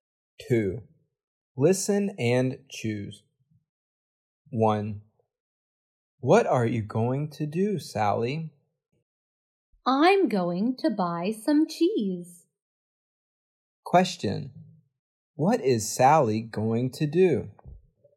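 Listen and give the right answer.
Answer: Buy some cheese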